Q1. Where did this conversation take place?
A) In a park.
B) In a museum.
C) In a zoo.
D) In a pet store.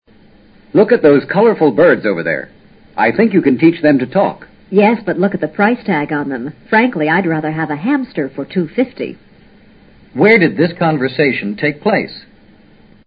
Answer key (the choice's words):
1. In a pet store.

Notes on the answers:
依据birds, hamster, the price tag on them 等词语提供的信息,可以判断说话人是在pet store。在A,B,C三种场所也许都可以见到birds, hamsters, 但不会见到price tag (价格标签)。 pet store 专卖供人饲养的宠物(猫、狗、鸟、鱼等)。 hamster: 仓鼠。 two - fifty: 两元五角。

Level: 世博高级听说